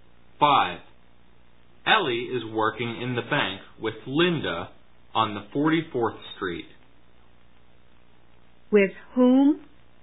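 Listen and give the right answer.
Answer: With Linda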